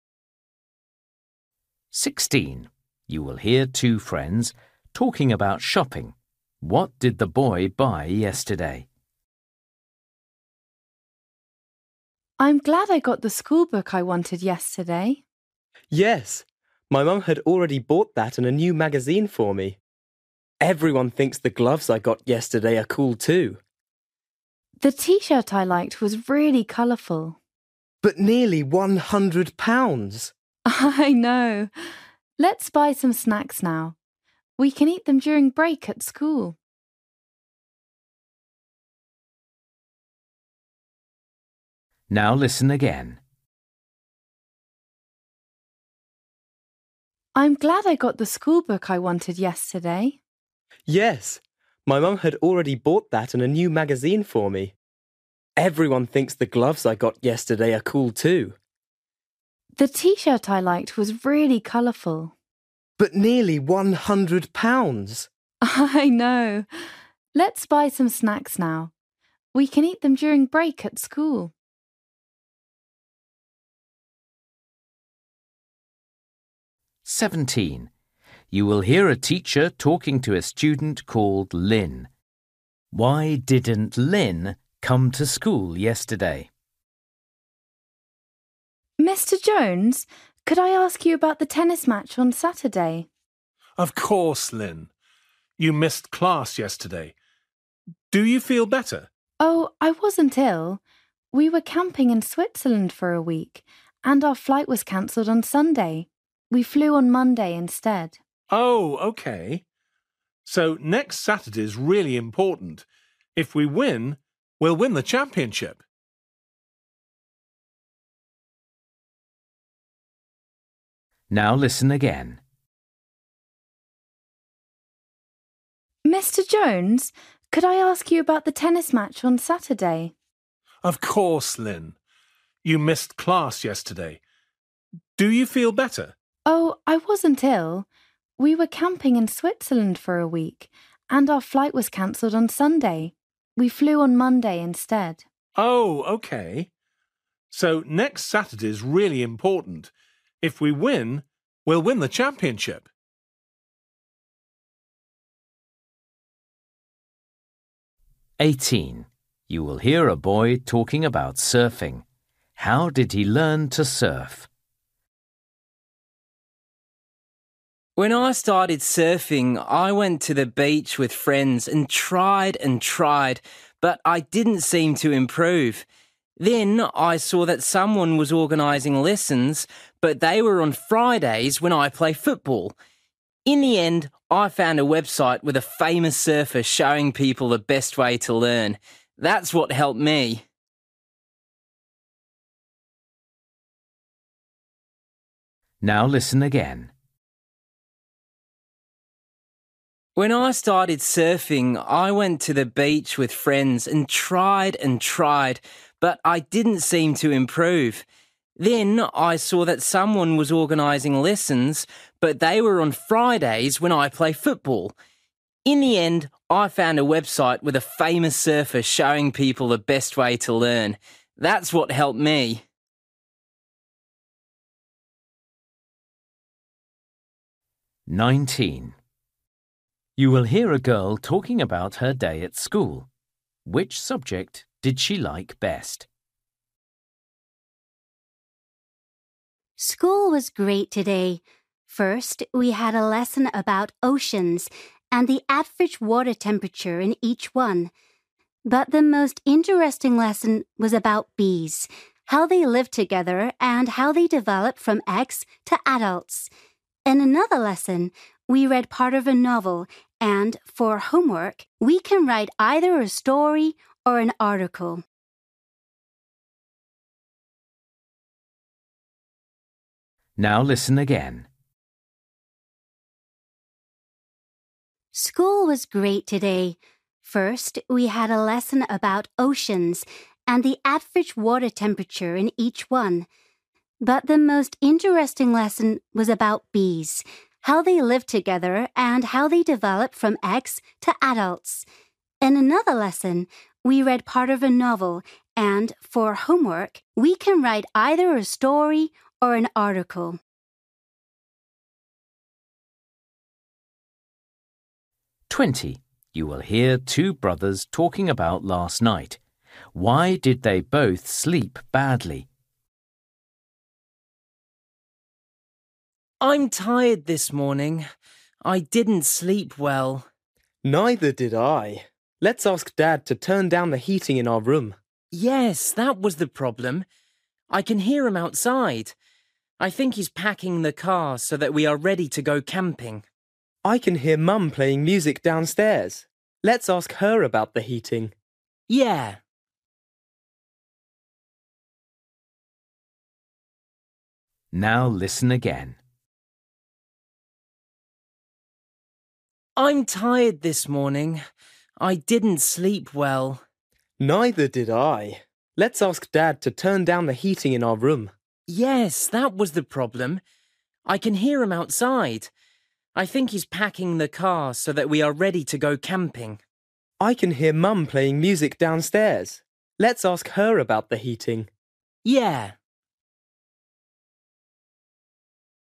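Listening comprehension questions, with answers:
For each question, choose the correct answer.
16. You will hear two friends talking about shopping. What did the boy buy yesterday?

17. You will hear a teacher talking to a student called Lyn. Why didn't Lyn come to school yesterday?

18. You will hear a boy talking about surfing. How did he learn to surf?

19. You will hear a girl talking about her day at school. Which subject did she like best?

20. You will hear two brothers talking about last night. Why did they both sleep badly?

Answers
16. gloves
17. Her flight home was cancelled.
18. From a website with a famous surfer
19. The lesson about bees (biology)
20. Their room was too hot (the heating was up).

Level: Luyện nghe trình độ A2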